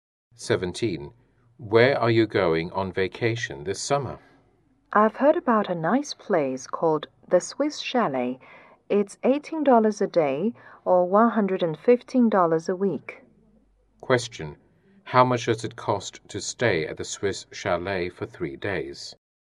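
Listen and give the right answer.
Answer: $54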